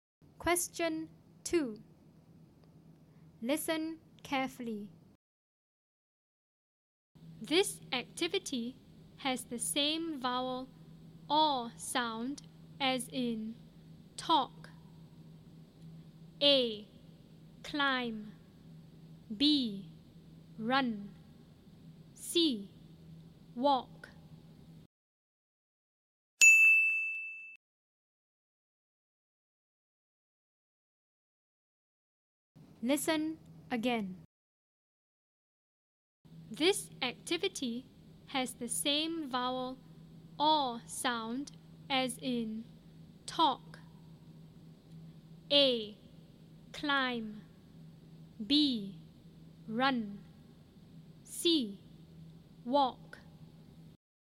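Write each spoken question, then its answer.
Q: This activity has the same vowel or sound as in talk.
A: C: Walk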